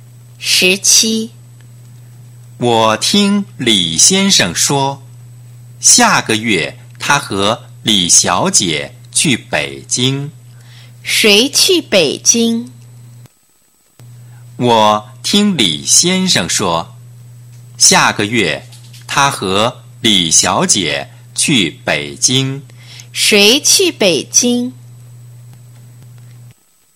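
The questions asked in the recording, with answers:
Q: 谁去北京?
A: 李先生和李小姐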